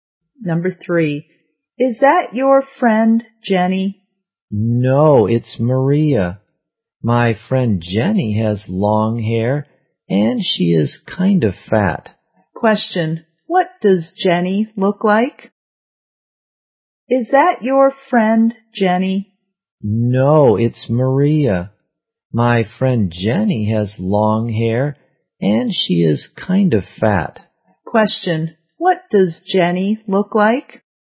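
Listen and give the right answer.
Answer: She has long hair and is kind of fat.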